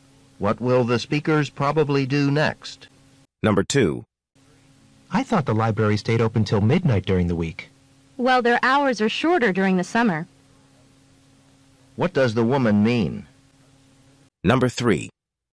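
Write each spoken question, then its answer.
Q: What does the woman mean?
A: The library closes earlier in the summer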